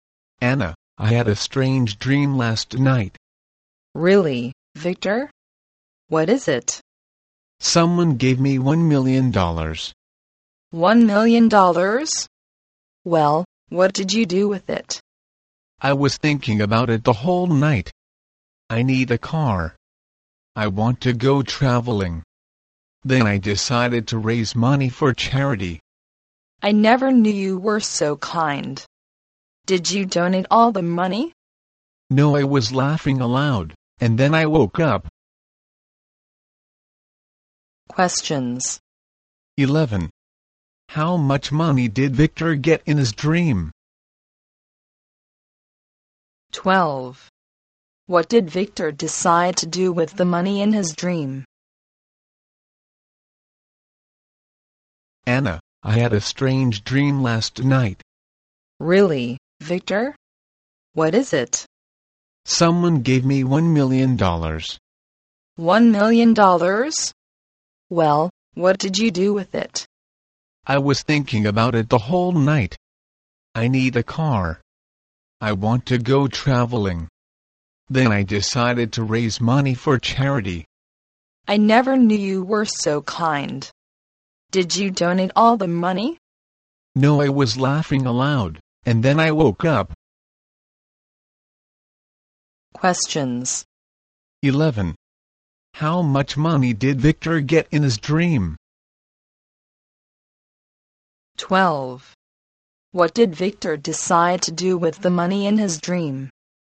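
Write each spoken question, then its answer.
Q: How much money did Victor get in his dream?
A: $1 million

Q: What did Victor decide to do with the money in his dream?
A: Raise money for charity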